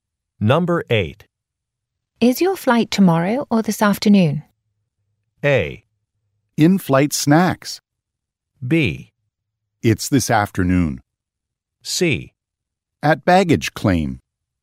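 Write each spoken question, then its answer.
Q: Is your flight tomorrow or this afternoon?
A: B: It's this afternoon.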